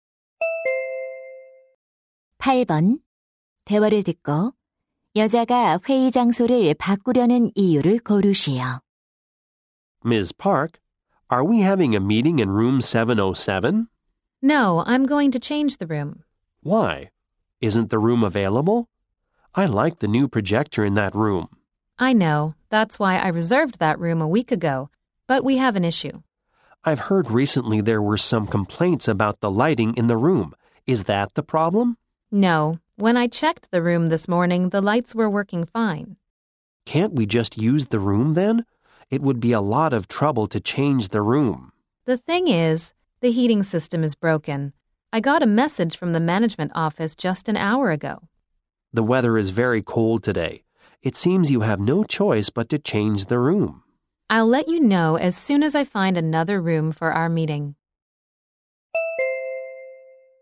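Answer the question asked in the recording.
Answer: 난방 시스템이 고장 나서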